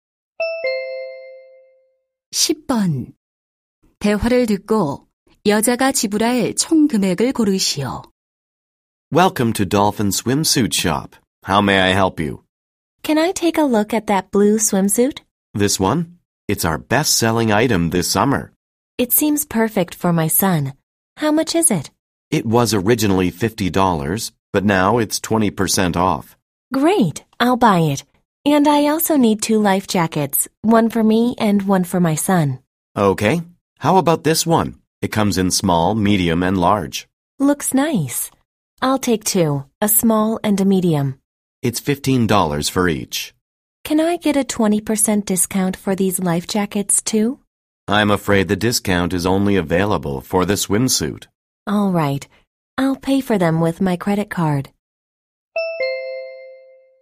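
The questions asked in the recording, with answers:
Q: 대화를 듣고 여자가 지불할 총 금액을 고르시오.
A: $70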